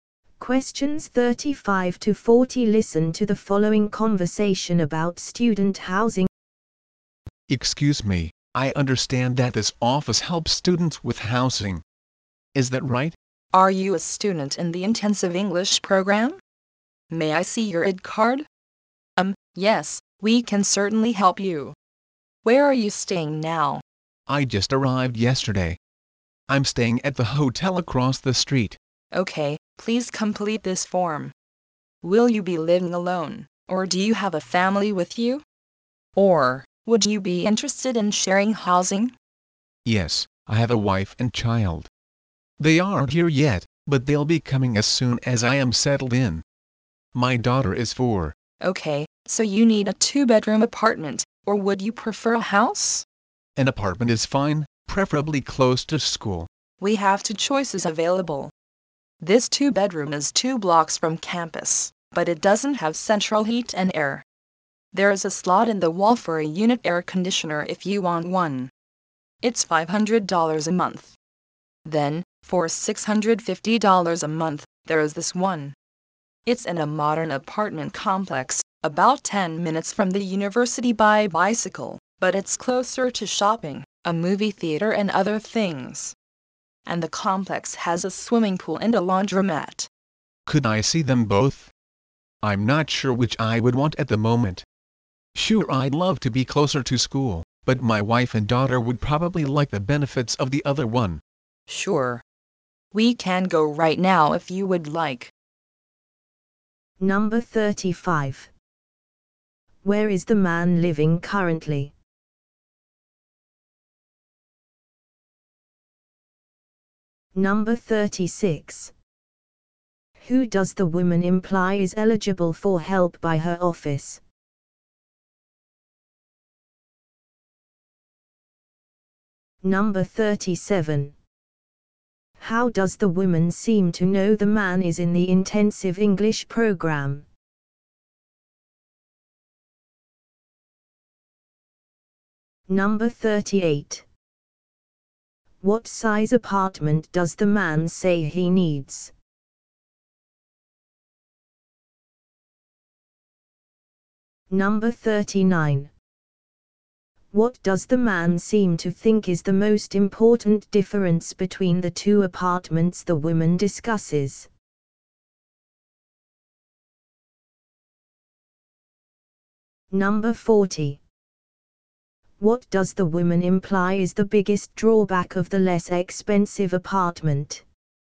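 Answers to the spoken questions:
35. At the hotel across the street
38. A two-bedroom apartment
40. It doesn't have central heat and air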